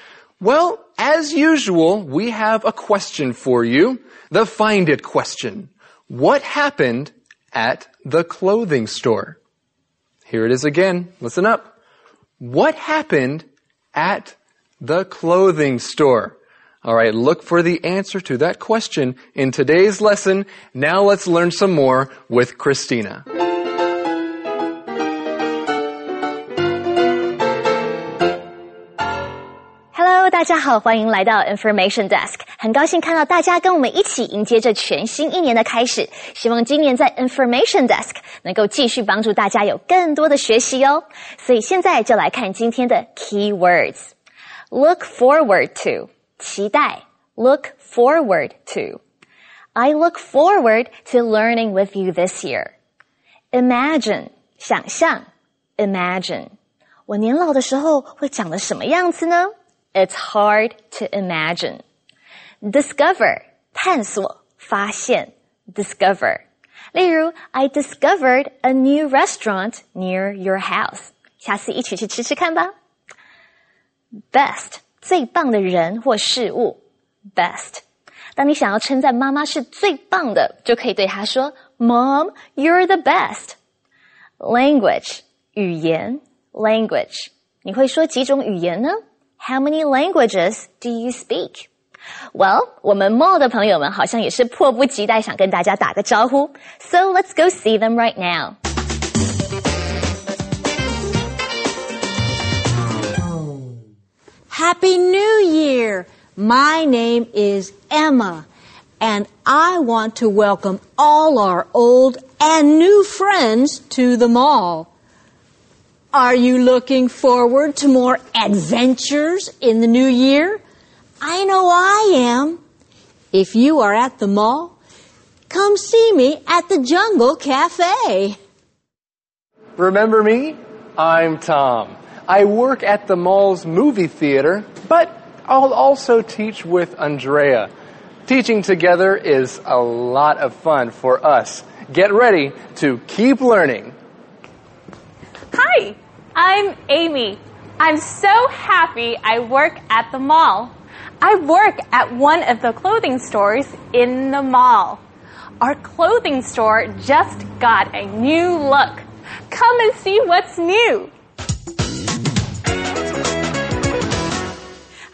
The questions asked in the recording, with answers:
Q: What happened at the clothing store?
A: The clothing store just got a new look.